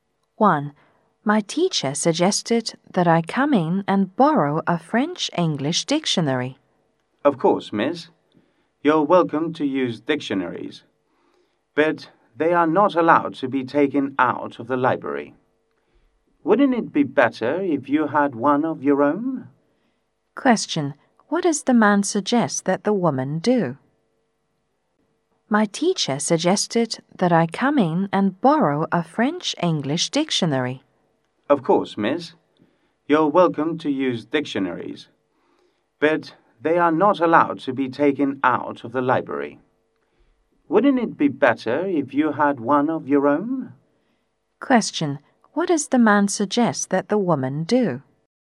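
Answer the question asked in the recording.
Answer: Get a dictionary of her own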